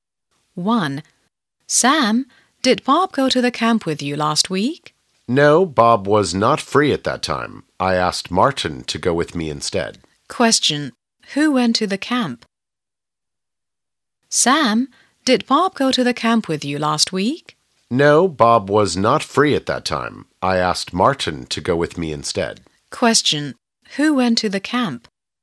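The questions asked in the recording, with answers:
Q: Who went to the camp?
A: Martin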